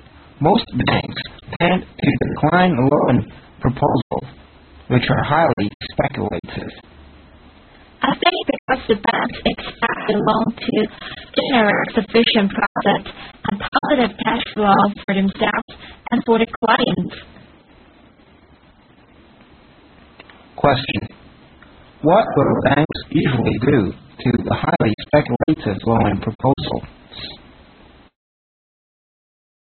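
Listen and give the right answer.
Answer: Decline them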